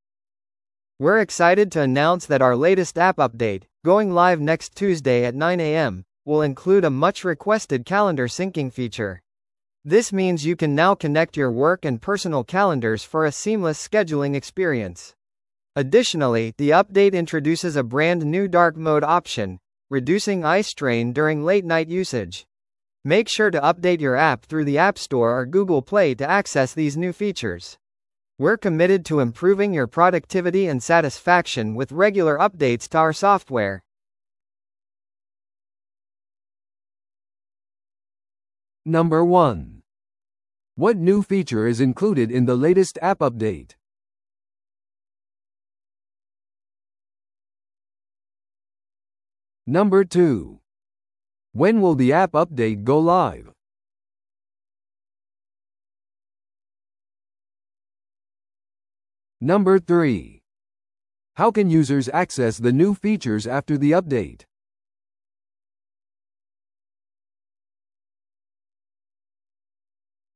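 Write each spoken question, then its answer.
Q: What new feature is included in the latest app update?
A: Calendar syncing (and a dark mode option)

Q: When will the app update go live?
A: Next Tuesday at 9 a.m.

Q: How can users access the new features after the update?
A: By updating the app through the App Store or Google Play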